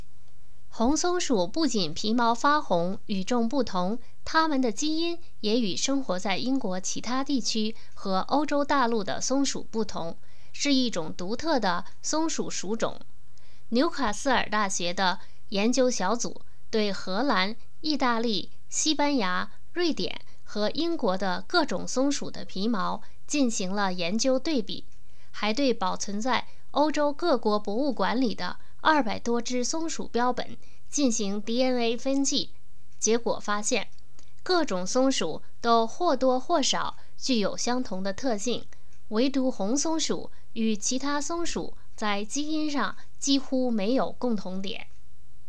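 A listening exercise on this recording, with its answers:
Please answer the following questions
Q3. 红松鼠与其他种类的松鼠有什么不同?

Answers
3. 红松鼠皮毛发红,基因也与其他松鼠不同,是一种独特的属种,与其他松鼠在基因上几乎没有共同点。

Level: 3rd Year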